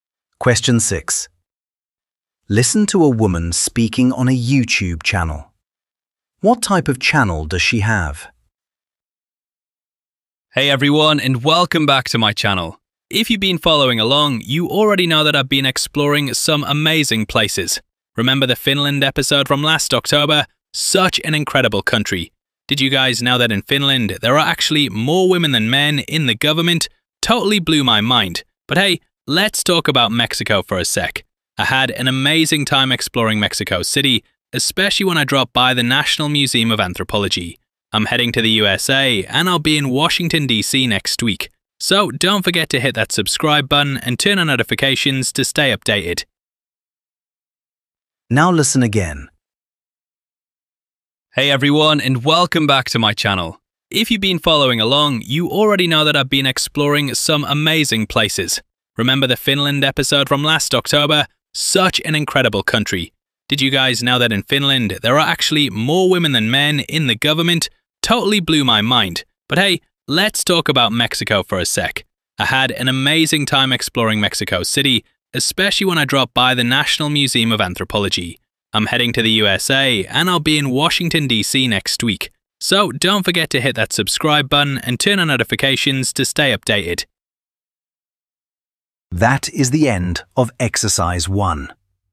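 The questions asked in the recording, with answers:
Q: What type of channel does she have?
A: A travel channel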